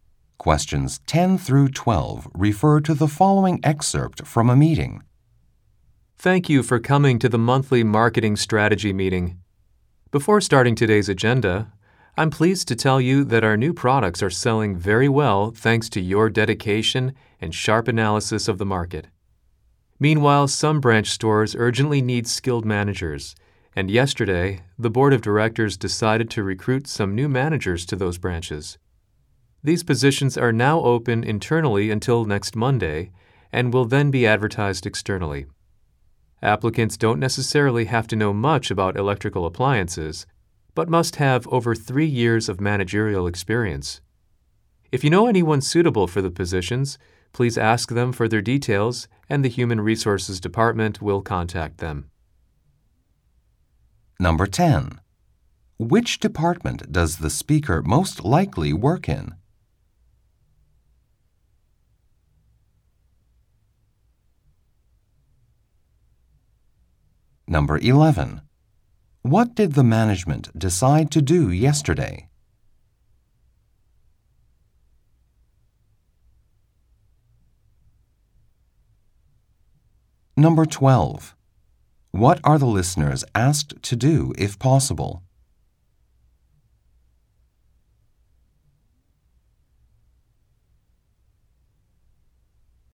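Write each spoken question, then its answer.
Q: What did the management decide to do yesterday?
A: Recruit new managers for some branch stores

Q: What are the listeners asked to do if possible?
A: Get details from suitable people they know for the positions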